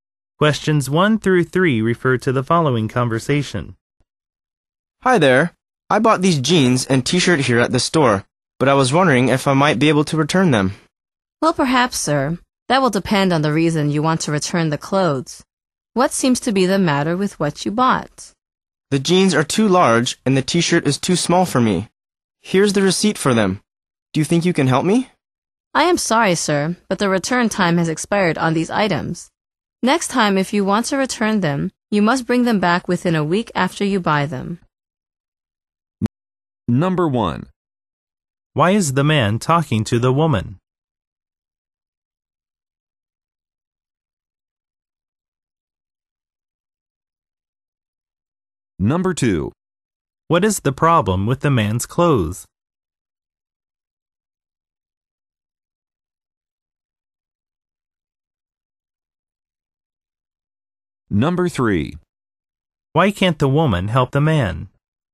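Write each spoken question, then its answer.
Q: Why is the man talking to the woman?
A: He wants to return the jeans and t-shirt he bought.

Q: What is the problem with the man's clothes?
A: The jeans are too large and the t-shirt is too small.

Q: Why can't the woman help the man?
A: The return time has expired; items must be returned within a week.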